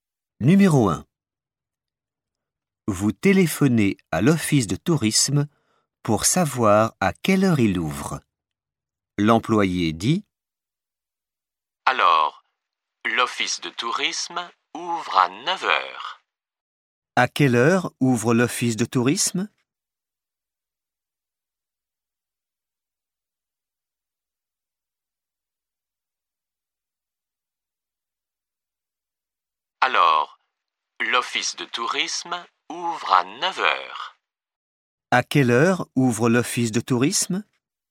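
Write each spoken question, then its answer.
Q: À quelle heure ouvre l'office de tourisme?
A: À 9 heures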